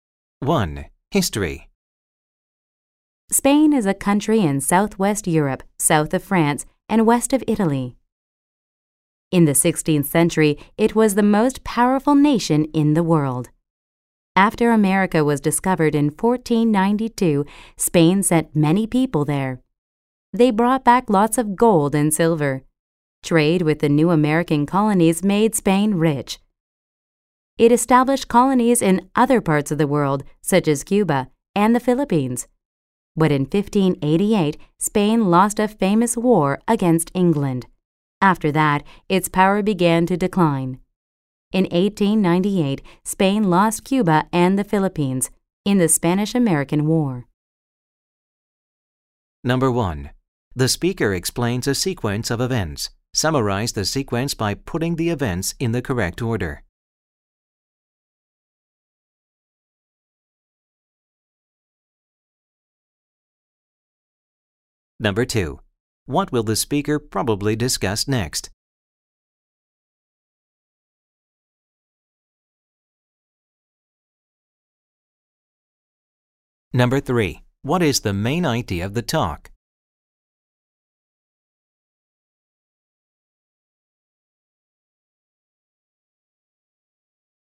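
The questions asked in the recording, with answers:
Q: What is the main idea of the talk?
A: How Spain rose to become the world's most powerful nation and then declined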